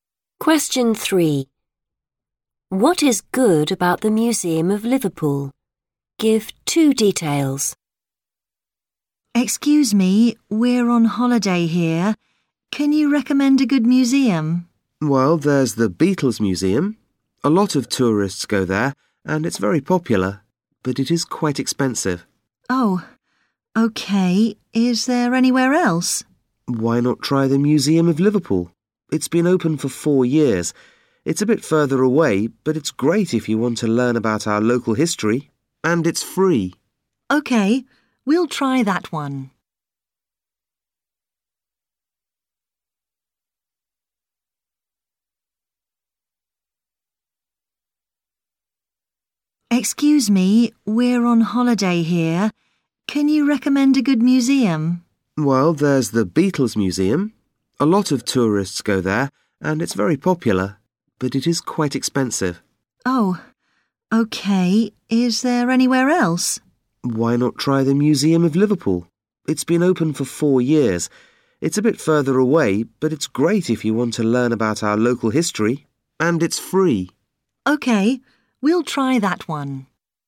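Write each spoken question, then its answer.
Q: What is good about the Museum of Liverpool?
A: good for learning local history; it's free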